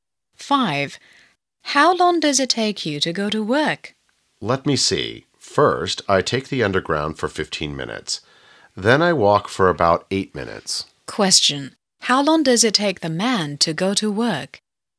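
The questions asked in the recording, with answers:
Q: How long does it take the man to go to work?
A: 23 minutes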